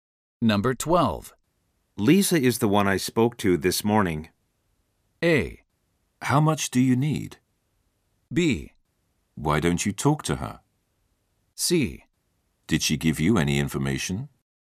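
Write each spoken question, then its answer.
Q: Lisa is the one I spoke to this morning.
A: C: Did she give you any information?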